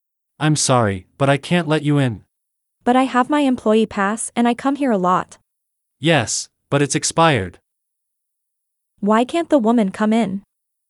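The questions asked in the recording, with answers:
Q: Why can't the woman come in?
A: Her employee pass has expired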